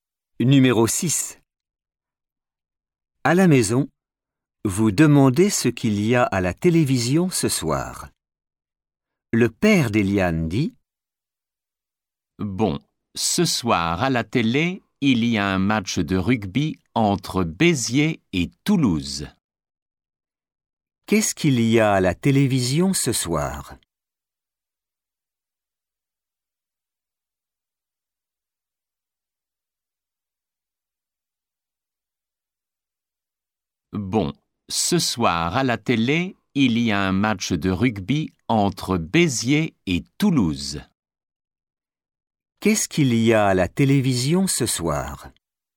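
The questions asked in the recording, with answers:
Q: Qu'est-ce qu'il y a à la télévision ce soir ?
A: Un match de rugby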